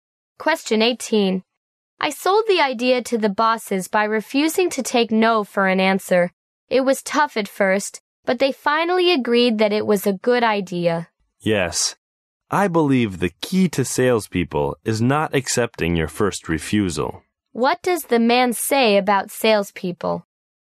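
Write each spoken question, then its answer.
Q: What does the man say about salespeople?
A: They shouldn't accept the first refusal.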